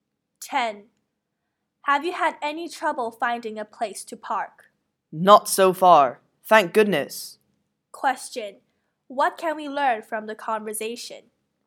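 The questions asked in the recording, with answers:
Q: What can we learn from the conversation?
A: The woman has had no trouble finding a parking place so far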